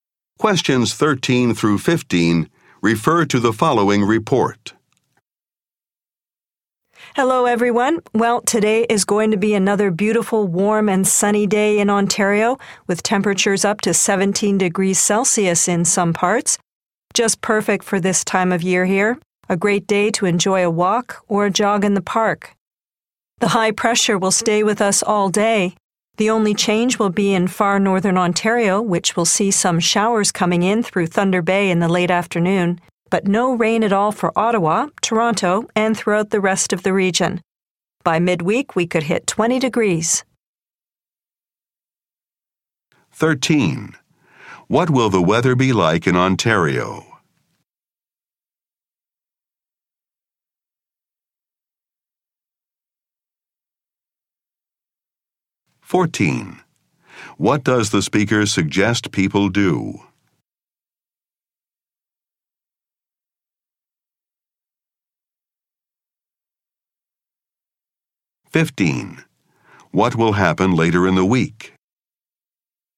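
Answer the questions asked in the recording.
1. Warm and sunny
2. Go for a walk or a jog in the park
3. It could reach 20 degrees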